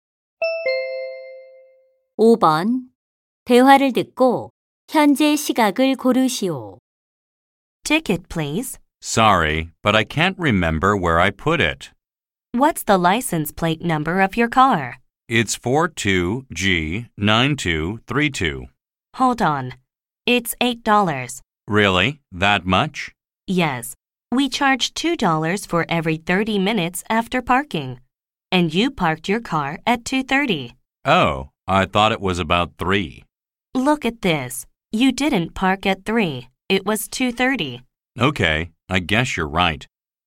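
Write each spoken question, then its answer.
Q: 대화를 듣고 현재 시각을 고르시오.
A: 4시 30분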